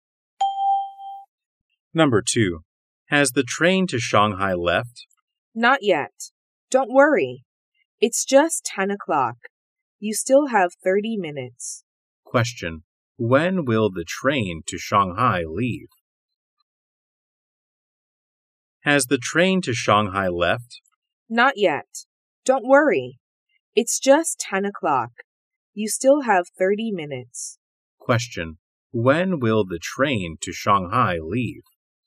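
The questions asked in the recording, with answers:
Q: When will the train to Shanghai leave?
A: At 10:30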